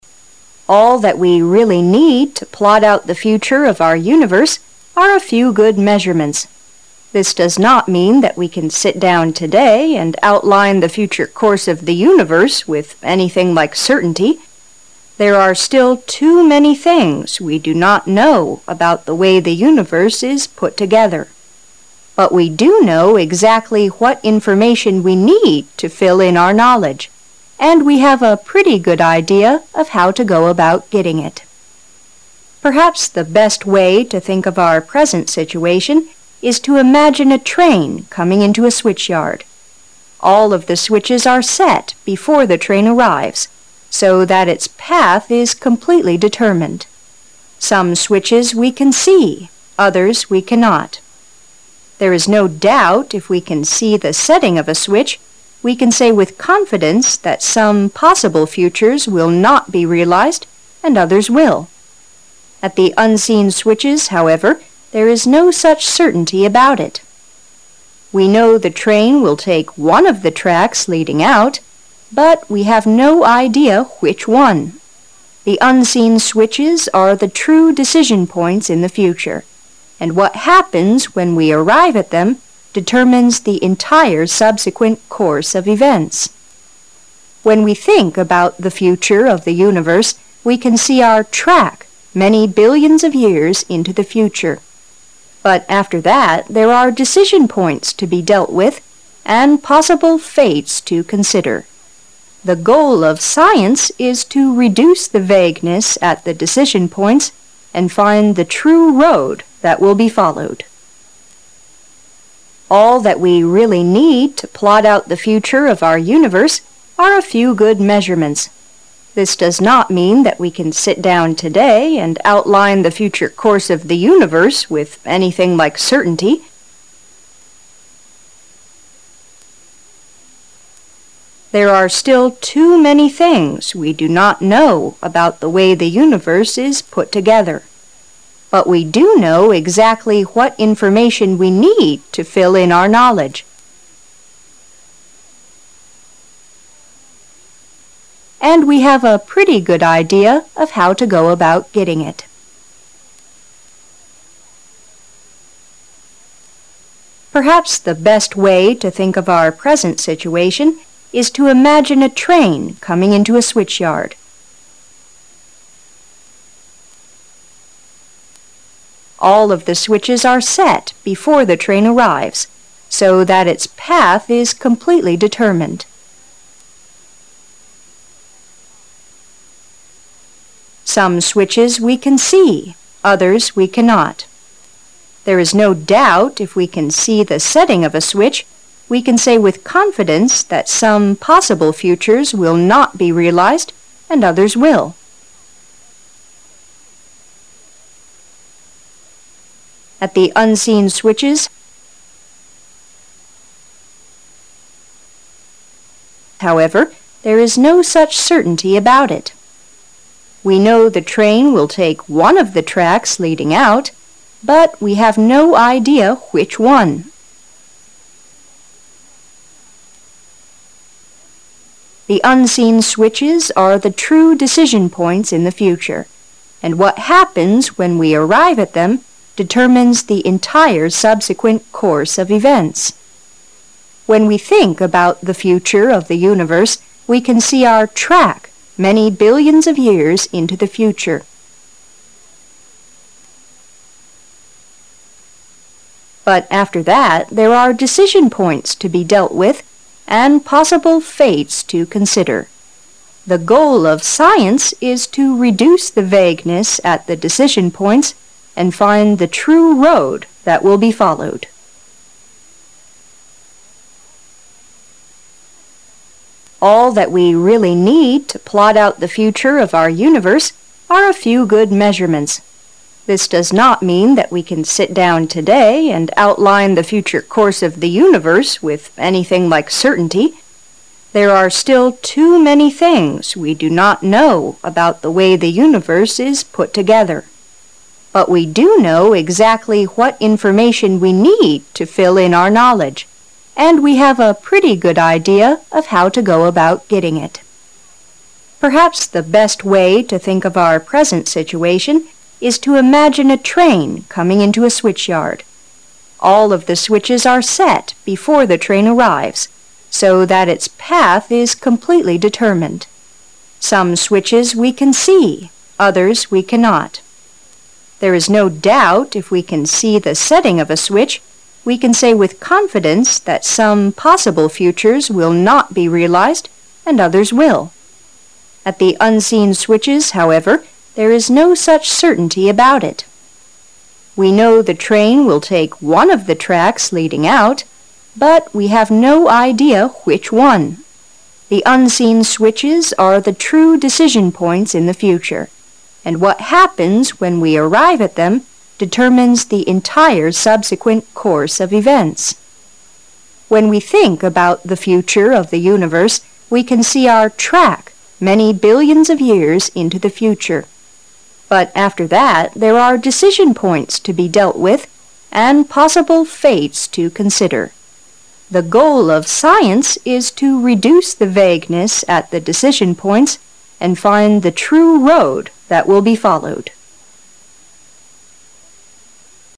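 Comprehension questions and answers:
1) This does not mean that we can sit down today and 1 the future course of the universe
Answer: outline

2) the future course of the universe with anything like 2 .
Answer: certainty

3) But we do know 3 what information we need to fill in our knowledge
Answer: exactly

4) we have a pretty good 4 of how to go about getting it.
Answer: idea

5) Perhaps the best way to think of our present situation is to 5 a train coming into a switchyard.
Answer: imagine

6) so that its path is completely 6 .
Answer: determined

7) we can say with confidence that some 7 futures, will not be realized and others will.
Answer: possible

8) At the unseen 8 , however, there is no such certainty about it.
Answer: switches

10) 10 , but after that there are decision points to be dealt with and possible fates to consider.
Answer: When we think about the future of the universe, we can see our track many billions of years into the future

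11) 11 .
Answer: The goal of science is to reduce the vagueness at the decision points and find the true road that will be followed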